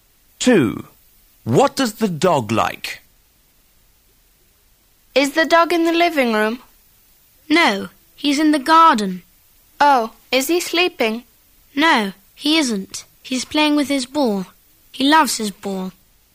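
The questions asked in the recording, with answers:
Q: What does the dog like?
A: His ball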